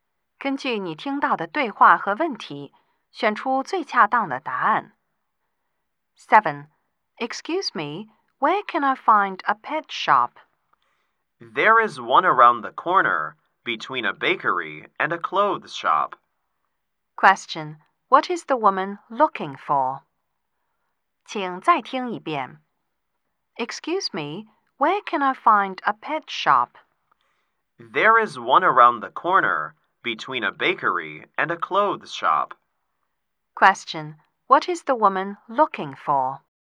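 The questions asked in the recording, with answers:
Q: Question, what is the woman looking for?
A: A pet shop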